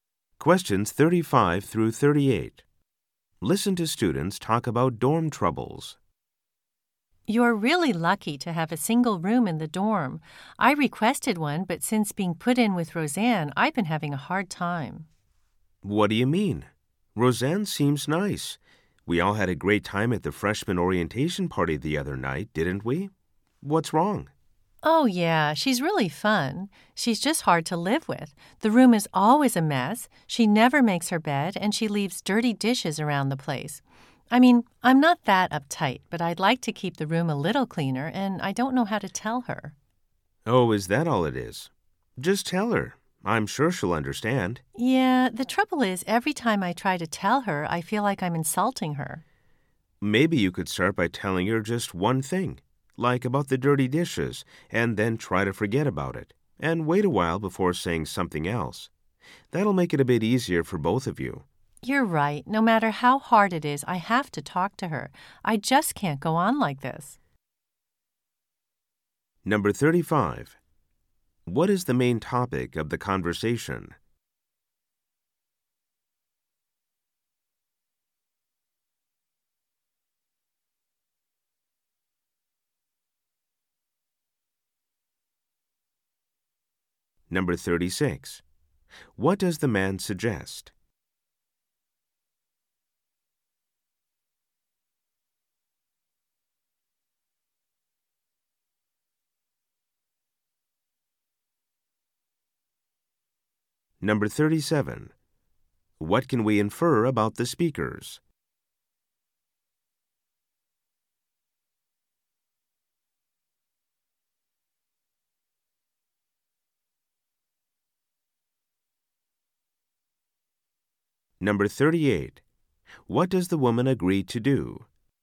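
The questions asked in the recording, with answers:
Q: What is the main topic of the conversation?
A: The woman's problems with her messy roommate

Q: What does the man suggest?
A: Tell her roommate about one thing at a time, starting with the dirty dishes

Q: What does the woman agree to do?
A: Talk to her roommate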